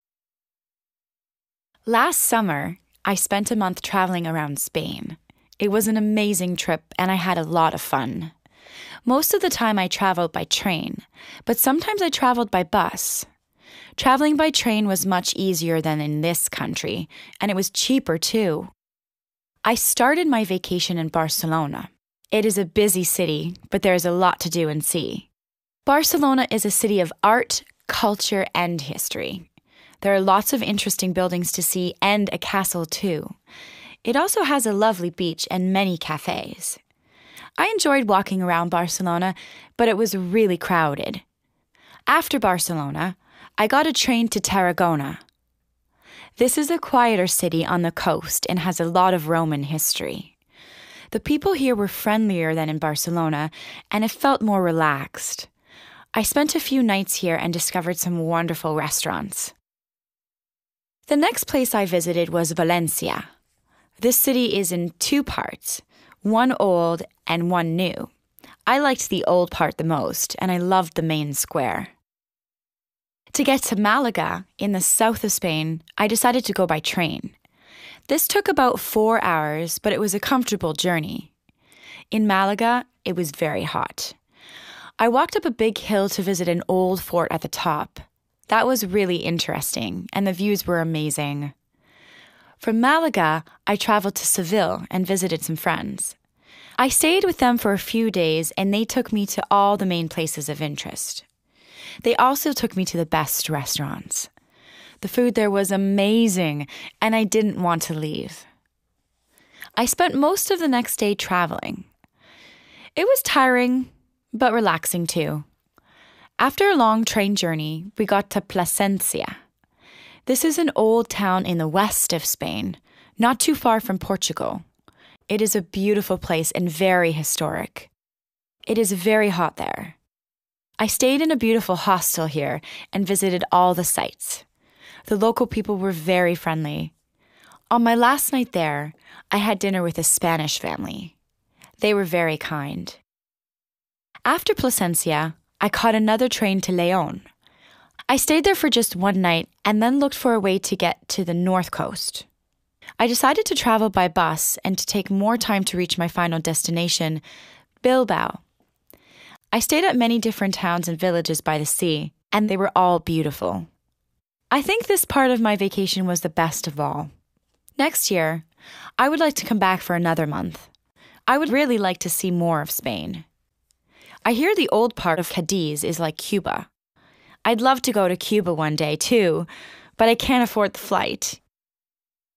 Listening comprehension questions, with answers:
2. Listen and write true (T) or false (F).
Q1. Fiona spent a month in Spain.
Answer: T

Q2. The trains were expensive.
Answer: F

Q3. Barcelona has a castle and beach.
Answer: T

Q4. Fiona liked the new part of Valencia the most.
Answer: F

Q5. It took Fiona four hours to get to Malaga.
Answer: T

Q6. In Malaga, Fiona walked up a large hill to visit an old friend.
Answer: F

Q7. Fiona stayed with friends in Seville.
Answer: T

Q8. Plasencia is quite close to Portugal.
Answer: T

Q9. The people in Plasencia were not friendly.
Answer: F

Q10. Fiona ended her vacation in Bilbao.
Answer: T

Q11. Fiona wants to go to Cuba for her next vacation.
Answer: F

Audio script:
Last summer, I spent a month traveling around Spain. It was an amazing trip, and I had a lot of fun. Most of the time, I traveled by train, but sometimes I traveled by bus. Traveling by train was much easier than in this country, and it was cheaper, too!
I started my vacation in Barcelona. It is a busy city, but there is a lot to do and see. Barcelona is a city of art, culture and history. There are lots of interesting buildings to see and a castle, too. It also has a lovely beach and many cafés. I enjoyed walking around Barcelona, but it was really crowded.
After Barcelona, I got a train to Tarragona. This is a quieter city on the coast and has a lot of Roman history. The people here were friendlier than in Barcelona, and it felt more relaxed. I spent a few nights here and discovered some wonderful restaurants.
The next place I visited was Valencia. This city is in two parts: one old and one new. I liked the old part the most, and I loved the main square.
To get to Malaga, in the south of Spain, I decided to go by train. This took about fours hours, but it was a comfortable journey. In Malaga, it was very hot. I walked up a big hill to visit an old fort at the top. That was really interesting, and the views were amazing.
From Malaga, I traveled to Seville and visited some friends. I stayed with them for a few days, and they took me to all the main places of interest. They also took me to the best restaurants. The food there was amazing, and I didn't want to leave.
I spent most of the next day traveling. It was tiring, but relaxing, too. After a long train journey, we got to Plasencia. This is an old town in the west of Spain, not too far from Portugal. It is a beautiful place and very historic. It is very hot there. I stayed in a beautiful hostel here and visited all the sights. The local people were very friendly. On my last night there, I had dinner with a Spanish family. They were very kind.
After Plasencia, I caught another train to León. I stayed there for just one night and then looked for a way to get to the north coast. I decided to travel by bus and to take more time to reach my final destination: Bilbao. I stayed at many different towns and villages by the sea, and they were all beautiful. I think this part of my vacation was the best of all. Next year, I would like to come back for another month. I would really like to see more of Spain. I hear the old part of Cadiz is like Cuba. I'd love to go to Cuba one day, too—but I can't afford the flight!